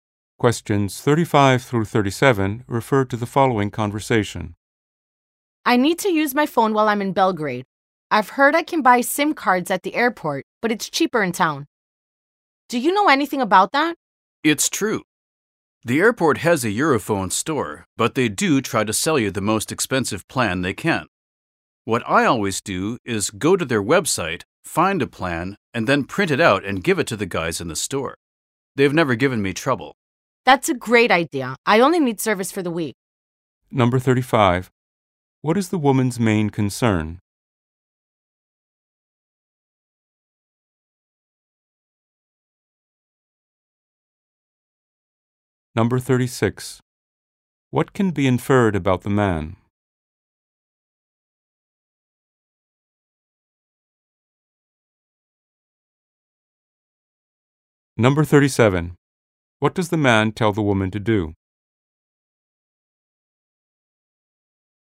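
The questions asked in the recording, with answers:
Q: What is the woman's main concern?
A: Getting a cheap SIM card for her phone in Belgrade

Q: What does the man tell the woman to do?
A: Find a plan on the website, print it and show it at the store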